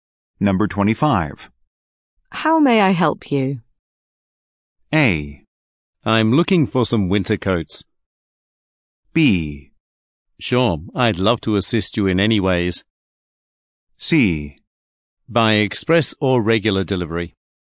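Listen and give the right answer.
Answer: A: I'm looking for some winter coats.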